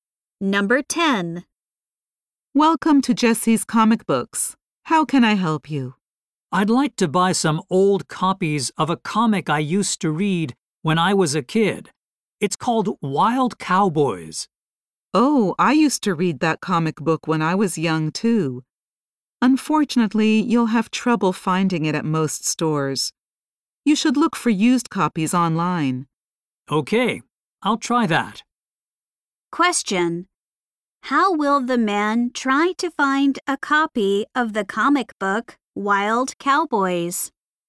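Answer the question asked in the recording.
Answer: By looking for used copies online.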